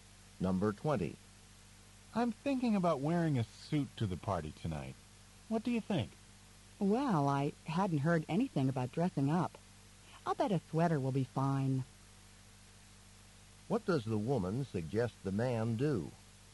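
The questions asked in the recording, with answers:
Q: What does the woman suggest the man do?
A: Wear a sweater instead of a suit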